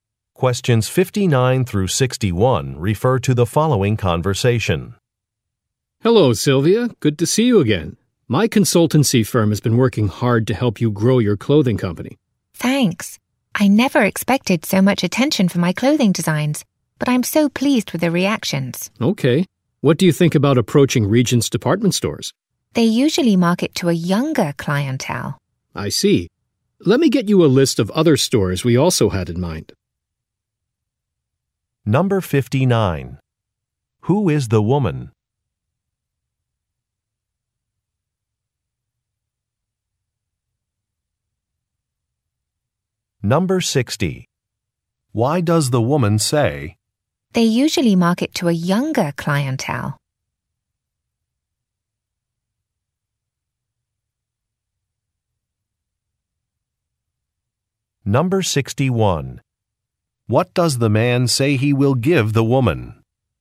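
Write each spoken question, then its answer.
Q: Who is the woman?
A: A clothing designer

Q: What does the man say he will give the woman?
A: A list of other stores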